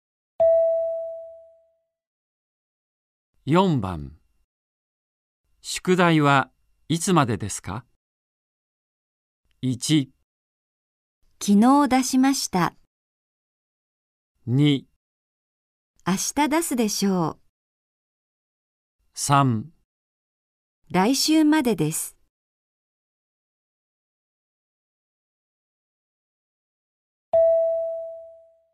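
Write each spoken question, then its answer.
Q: 宿題はいつまでですか?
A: 3: 来週までです。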